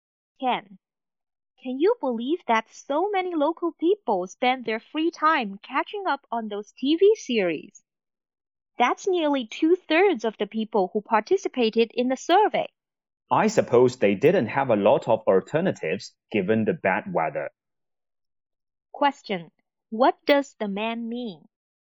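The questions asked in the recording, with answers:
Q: What does the man mean?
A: People watched TV series because the bad weather left few alternatives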